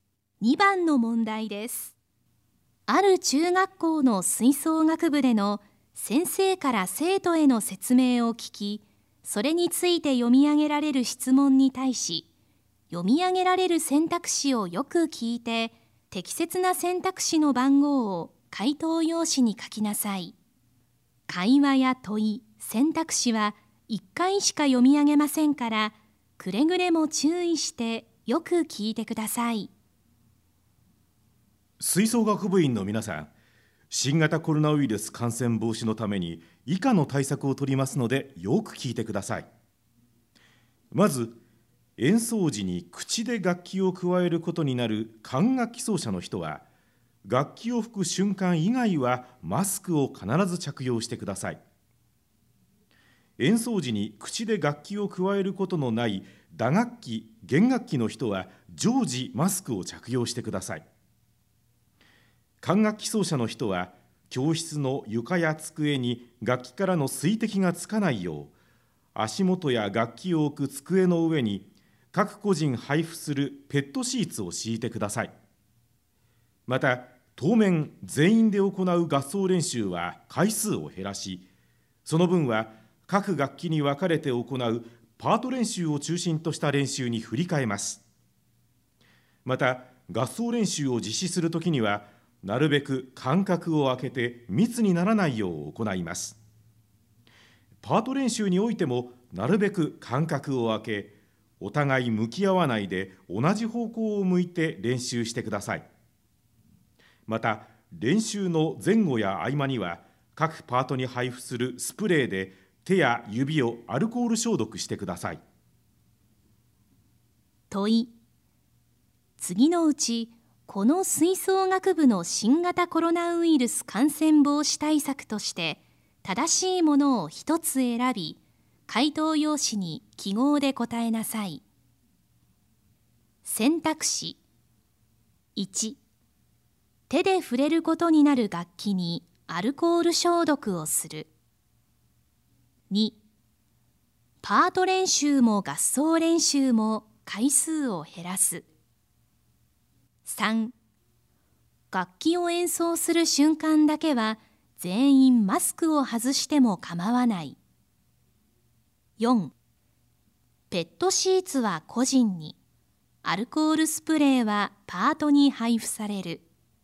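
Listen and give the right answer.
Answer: 4: ペットシーツは個人に、アルコールスプレーはパートに配布される。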